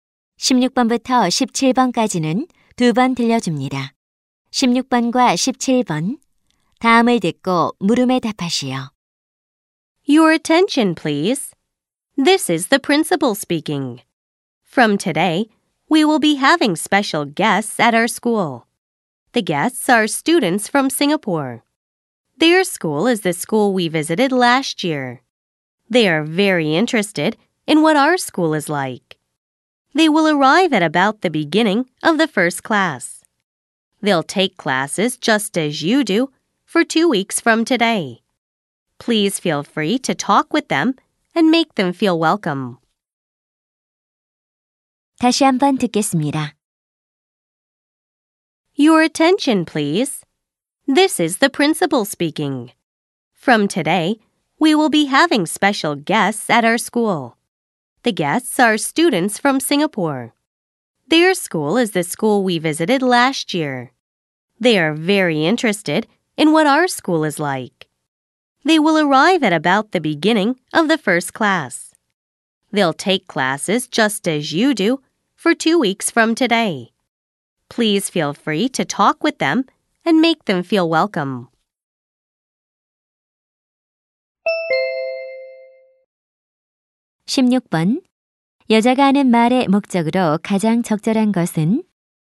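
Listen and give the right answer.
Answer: 싱가포르 학생들의 방문을 알리려고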